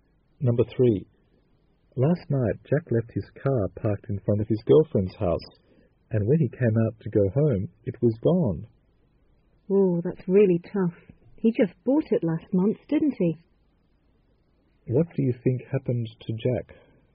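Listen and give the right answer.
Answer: His car was stolen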